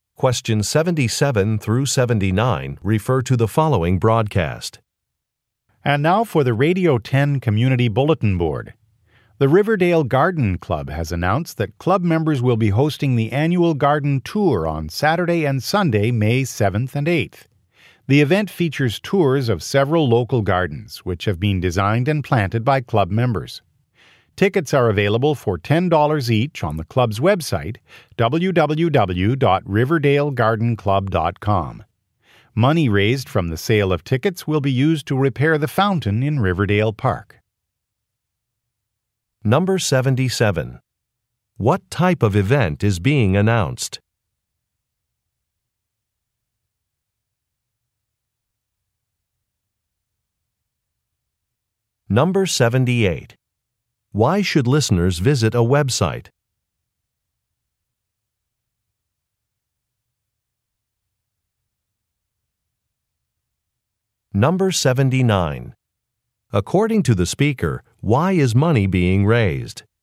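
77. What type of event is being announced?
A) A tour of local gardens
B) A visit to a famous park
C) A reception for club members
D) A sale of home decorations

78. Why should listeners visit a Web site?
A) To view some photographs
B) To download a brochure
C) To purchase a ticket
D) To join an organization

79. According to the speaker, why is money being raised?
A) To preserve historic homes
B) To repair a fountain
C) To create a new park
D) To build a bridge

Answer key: 77A, 78C, 79B

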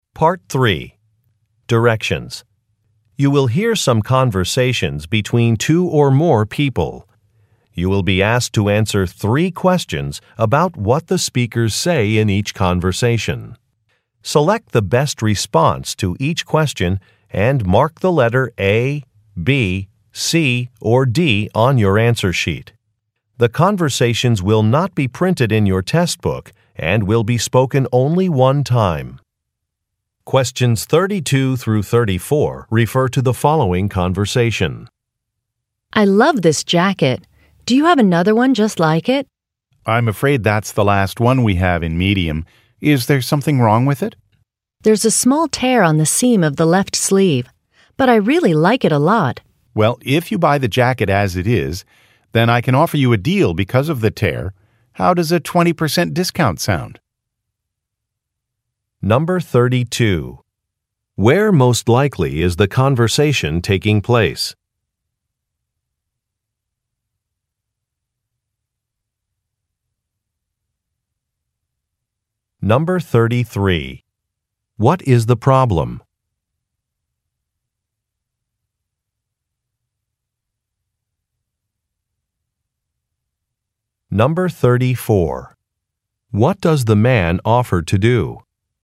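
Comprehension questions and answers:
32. Where most likely is the conversation taking place?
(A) In a clothing store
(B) In a furniture factory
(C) In a restaurant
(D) In a dry-cleaning shop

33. What is the problem?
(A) Some merchandise has been lost.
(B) Some clothing is the wrong size.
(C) An item is damaged.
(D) An order has not arrived.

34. What does the man offer to do?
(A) Issue a refund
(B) Reduce a price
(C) Speak to a manager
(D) Check the inventory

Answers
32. A
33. C
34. B

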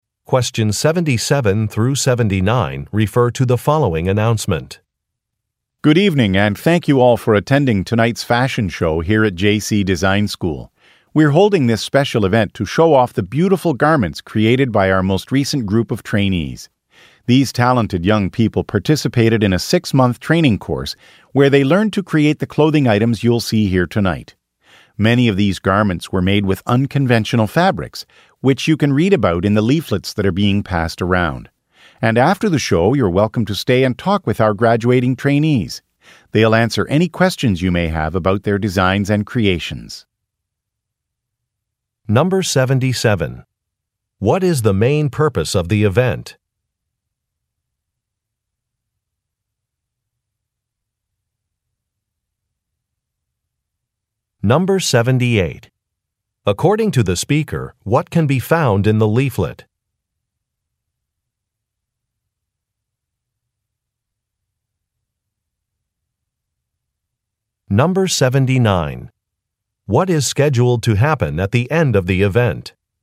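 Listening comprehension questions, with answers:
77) What is the main purpose of the event?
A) To celebrate successful sales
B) To exhibit course projects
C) To advertise a clothing store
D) To recruit new teachers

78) According to the speaker, what can be found in the leaflet?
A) Dates of future shows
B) Names of event organizers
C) Information about materials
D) Instructions for enrollment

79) What is scheduled to happen at the end of the event?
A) A celebrity will appear on stage.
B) Some creations will be sold at auction.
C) A reception will be held in a different room.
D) Students will answer questions about their work.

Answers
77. B
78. C
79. D

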